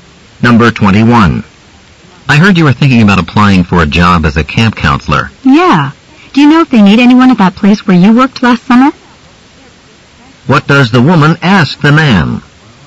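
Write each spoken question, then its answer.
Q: What does the woman ask the man?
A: Whether the camp where he worked last summer needs counselors.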